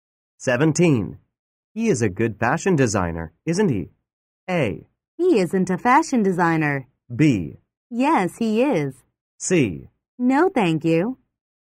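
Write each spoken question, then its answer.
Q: He is a good fashion designer, isn't he?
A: B: Yes, he is.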